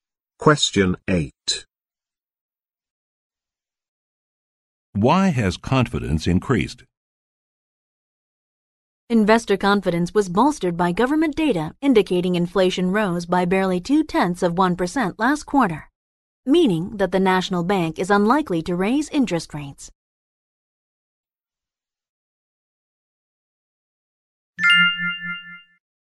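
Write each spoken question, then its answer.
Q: Why has confidence increased?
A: Inflation rose only slightly, so interest rates are unlikely to rise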